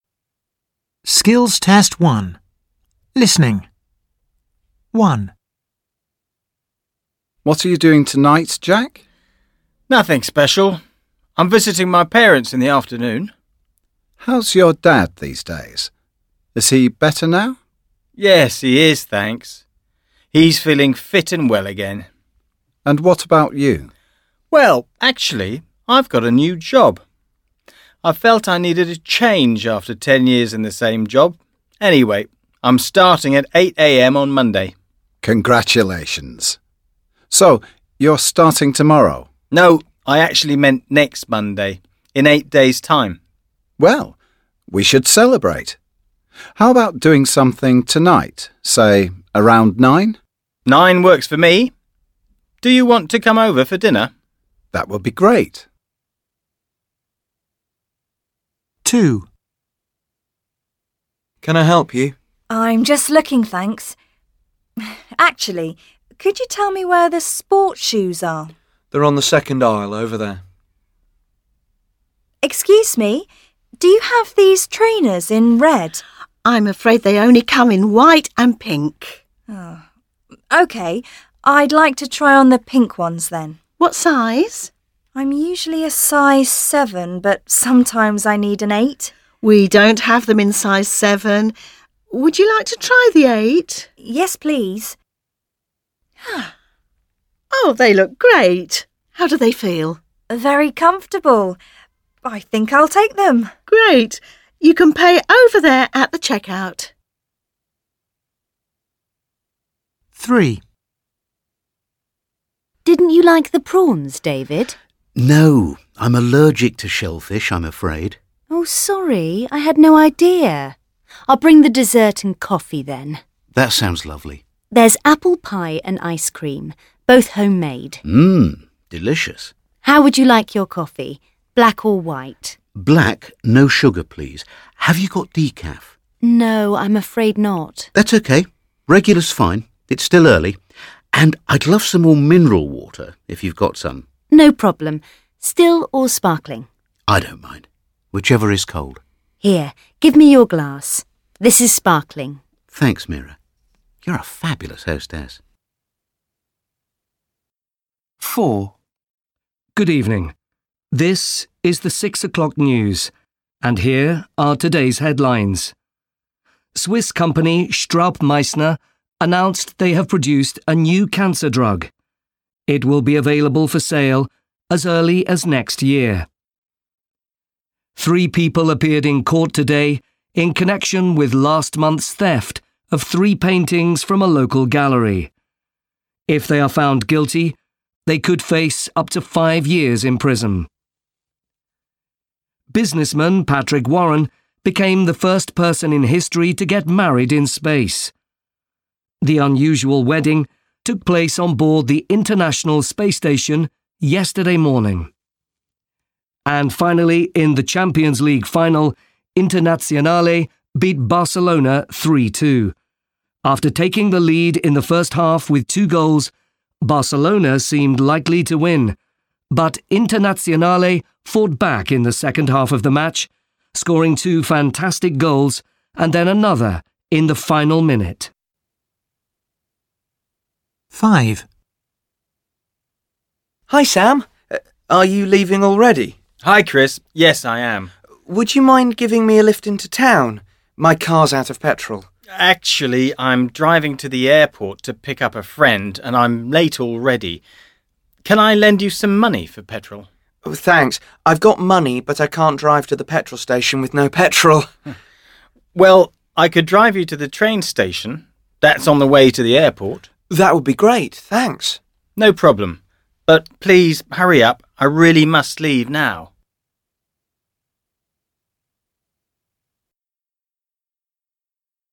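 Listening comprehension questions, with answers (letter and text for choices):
Listen and choose the correct answer. Write a or b in the box.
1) What are Jack and Will celebrating?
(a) Jack's father got better after being unwell.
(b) Jack's changing jobs.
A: (b) Jack's changing jobs.

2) What does the woman buy in the shop?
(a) A pair of size 7 shoes.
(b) She buys a pair of pink trainers.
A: (b) She buys a pair of pink trainers.

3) Which of the following things does the guest NOT eat or drink?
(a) Prawns because he's allergic.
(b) Mineral water if it's cold.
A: (a) Prawns because he's allergic.

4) Which news does the newsreader mention?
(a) A Swiss company has stopped selling its new cancer drug.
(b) Thieves stole three paintings from a local gallery.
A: (b) Thieves stole three paintings from a local gallery.

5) Where does Chris want to go?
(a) Into town.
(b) To the airport.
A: (a) Into town.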